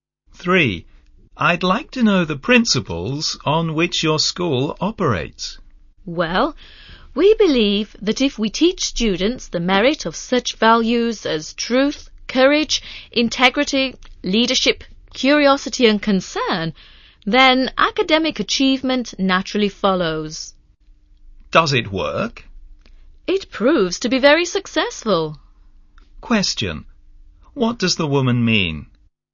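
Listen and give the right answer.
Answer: The school's approach of teaching values, which leads to academic achievement, has been very successful.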